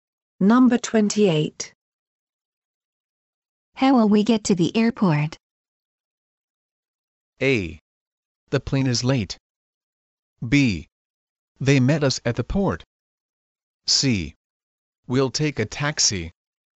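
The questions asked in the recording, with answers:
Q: How will we get to the airport?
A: C: We'll take a taxi.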